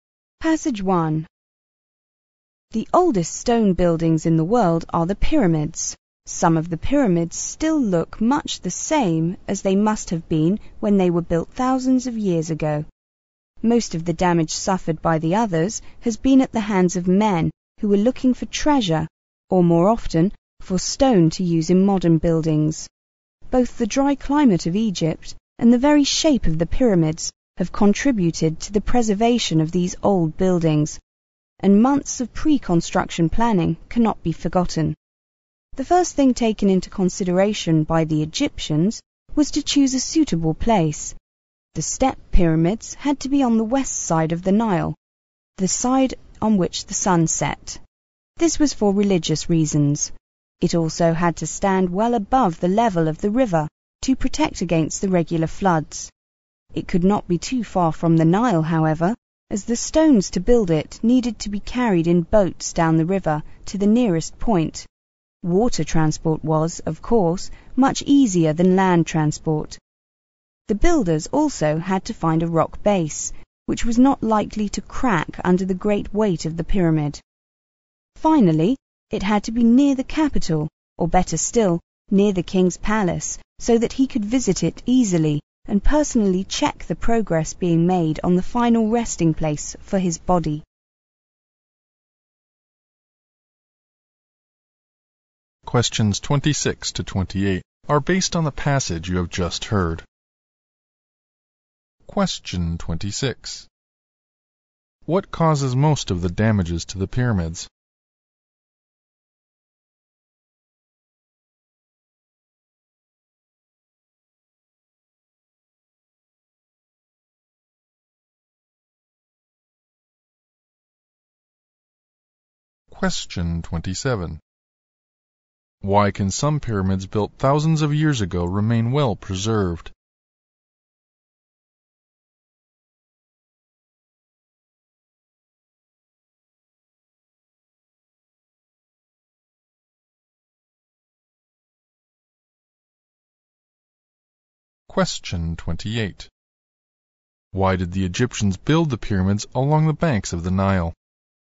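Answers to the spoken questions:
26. People looking for treasure or stone for modern buildings
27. The dry climate, their shape and careful planning
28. Stones could be transported by boat on the river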